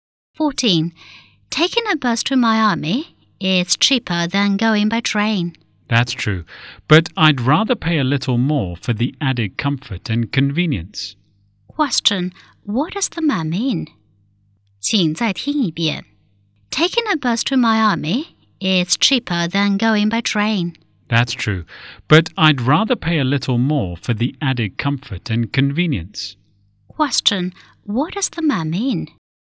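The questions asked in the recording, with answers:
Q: Question. What does the man mean?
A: He would rather take the train to Miami for comfort and convenience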